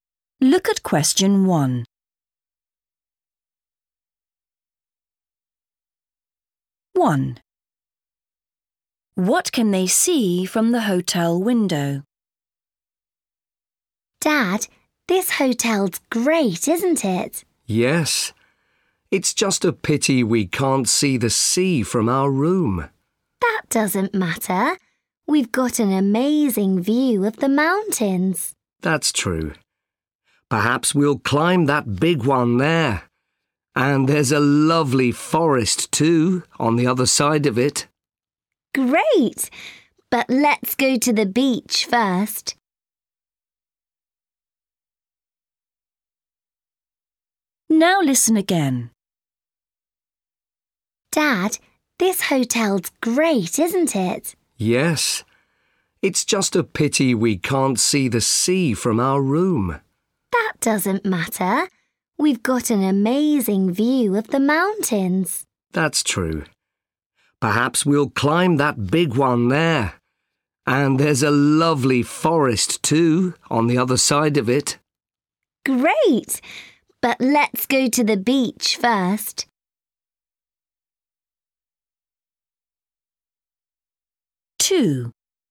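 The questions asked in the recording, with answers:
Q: What can they see from the hotel window?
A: mountains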